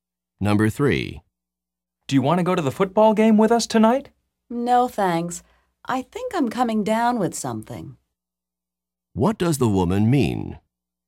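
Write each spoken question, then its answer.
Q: What does the woman mean?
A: She thinks she is getting sick.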